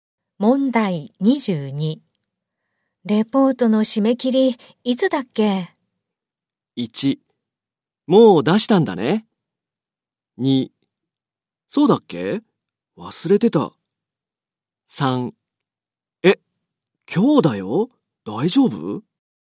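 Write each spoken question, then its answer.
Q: レポートの締め切り、いつだっけ?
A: 3: え、今日だよ?大丈夫?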